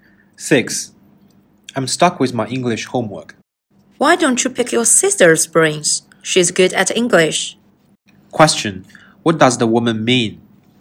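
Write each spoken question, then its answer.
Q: What does the woman mean?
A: He should ask his sister for help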